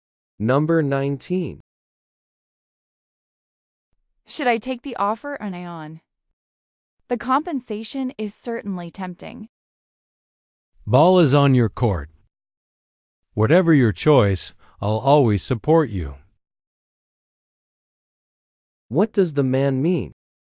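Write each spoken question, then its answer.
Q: What does the man mean?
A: The decision is up to the woman.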